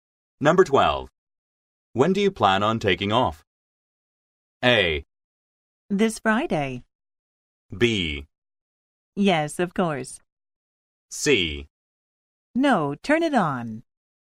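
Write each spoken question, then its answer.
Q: When do you plan on taking off?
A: A: This Friday.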